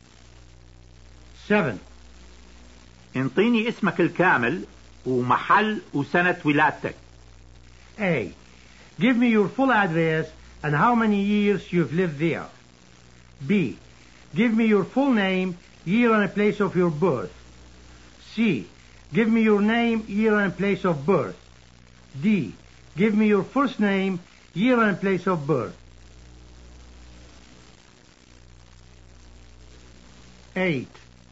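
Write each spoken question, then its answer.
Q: انطيني اسمك الكامل ومحل وسنة ولادتك.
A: B: Give me your full name, year and place of your birth.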